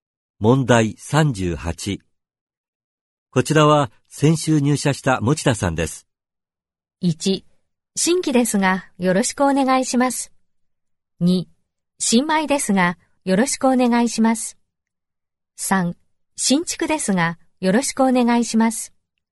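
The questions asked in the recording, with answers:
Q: こちらは先週入社した持田さんです。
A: 2: 新米ですがよろしくお願いします。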